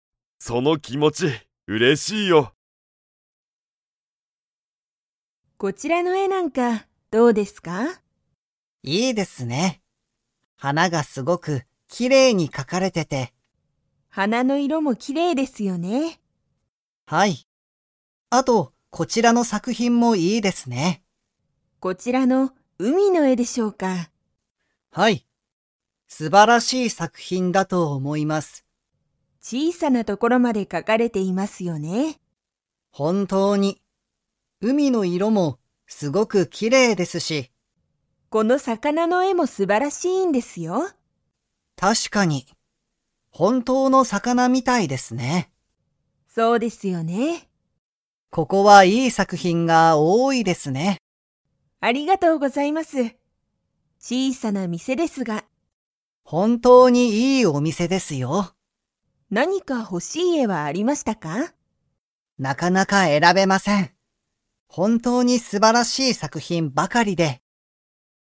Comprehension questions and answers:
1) 海うみの絵えは、 所ところまで描かかれている。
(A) きれいな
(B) 小ちいさな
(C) かわいい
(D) ほしい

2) 大塚おおつかさんは、ほしい絵えを 。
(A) 選えらべた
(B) 選えらべていない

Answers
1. B
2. B

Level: Level 3

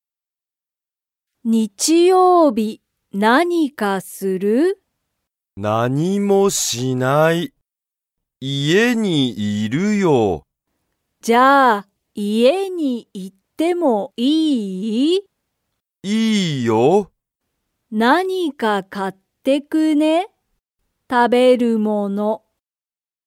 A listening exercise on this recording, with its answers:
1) 日曜日(にちようび)、ゆうじは家(いえ)にいますか?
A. はい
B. いいえ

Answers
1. A

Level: Level 1

